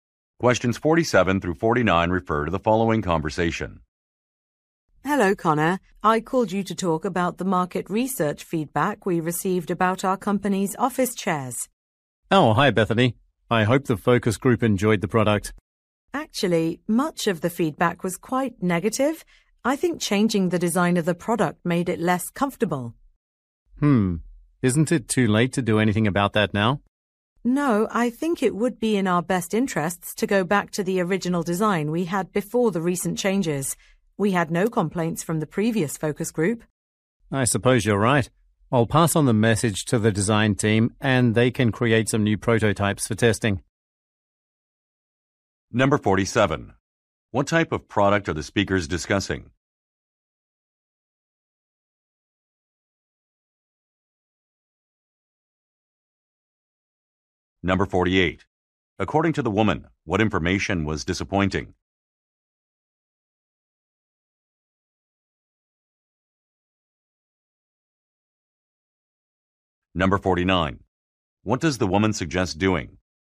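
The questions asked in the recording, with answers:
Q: What type of product are the speakers discussing?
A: Office chairs

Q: According to the woman, what information was disappointing?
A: Negative focus group feedback

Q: What does the woman suggest doing?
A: Going back to the original design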